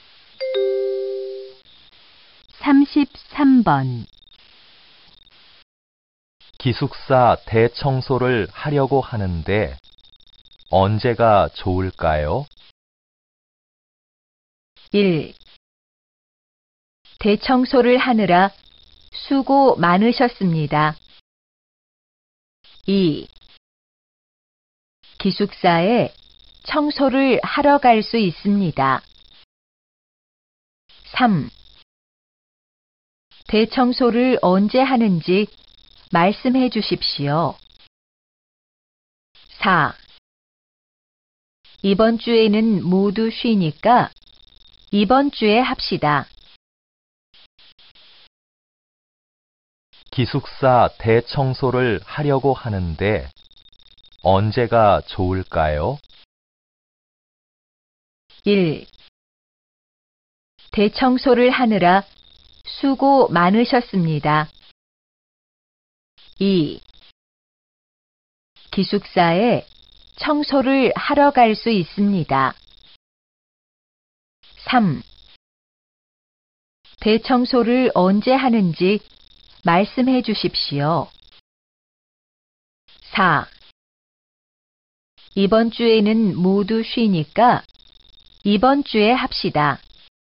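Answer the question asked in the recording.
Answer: 4: 이번 주에는 모두 쉬니까 이번 주에 합시다.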